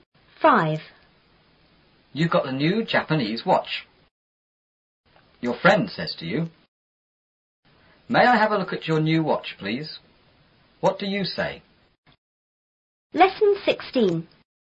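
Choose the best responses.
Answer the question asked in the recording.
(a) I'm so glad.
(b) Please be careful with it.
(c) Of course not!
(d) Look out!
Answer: (b) Please be careful with it.

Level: 初中英语广州版4B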